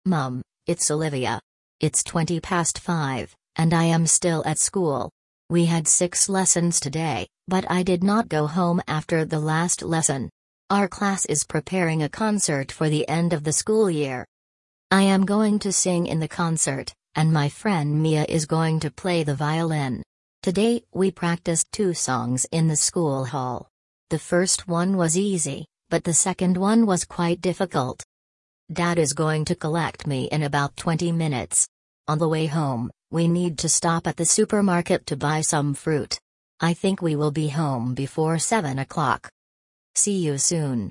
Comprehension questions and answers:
Прослушайте текст и определите, какие из приведённых утверждений A–E соответствуют содержанию текста (1 — True), а какие не соответствуют (2 — False). Вы услышите текст дважды.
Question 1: Olivia is speaking to her mother.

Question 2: Olivia had seven lessons at school today.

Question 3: Olivia stayed at school to prepare for a concert.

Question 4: Olivia's friend plays the violin.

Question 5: Olivia is going to return home by bus.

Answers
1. True
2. False
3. True
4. True
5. False

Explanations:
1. Оливия обращается к маме: Mum, it's Olivia.
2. У Оливии было шесть уроков, а не семь.
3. После уроков Оливия осталась в школе, чтобы репетировать концерт.
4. Подруга Оливии Миа собирается играть на скрипке.
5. Домой Оливию заберёт папа, поэтому она поедет на машине, а не на автобусе.

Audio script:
Mum, it's Olivia.
It's twenty past five, and I am still at school. We had six lessons today, but I did not go home after the last lesson. Our class is preparing a concert for the end of the school year.
I am going to sing in the concert, and my friend Mia is going to play the violin. Today we practised two songs in the school hall. The first one was easy, but the second one was quite difficult.
Dad is going to collect me in about twenty minutes. On the way home, we need to stop at the supermarket to buy some fruit. I think we will be home before seven o'clock.
See you soon.